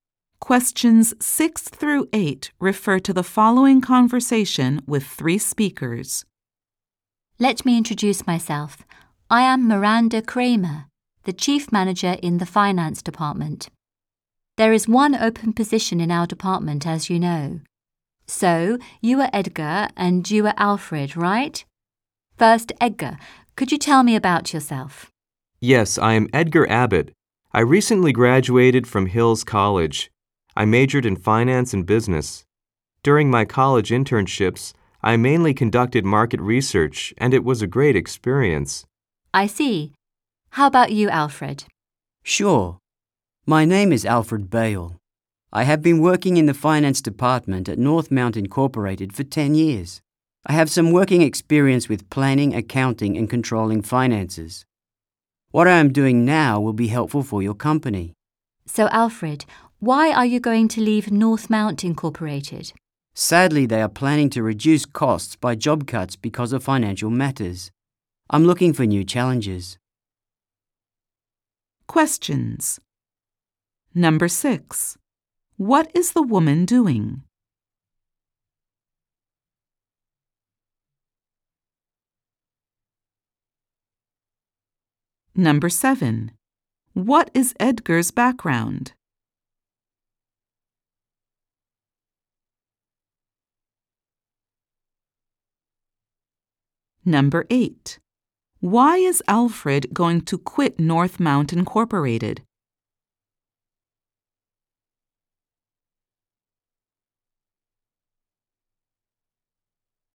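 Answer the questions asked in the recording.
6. Interviewing job candidates
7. He recently graduated from Hills College with a major in finance and business
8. The company plans to cut jobs to reduce costs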